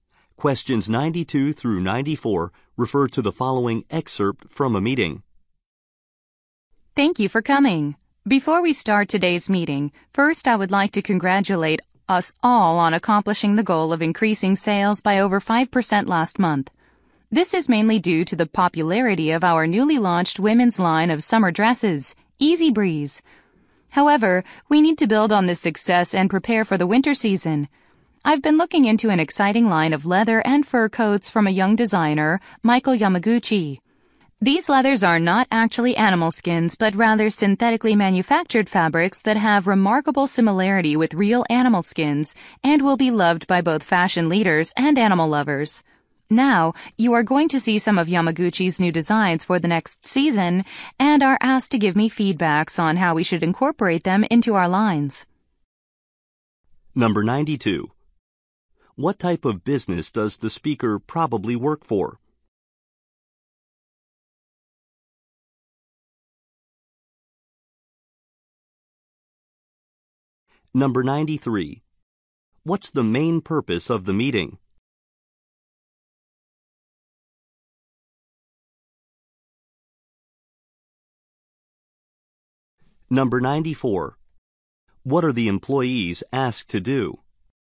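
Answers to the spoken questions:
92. A clothing company
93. To prepare for the winter season with new designs
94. Give feedback on Yamaguchi's new designs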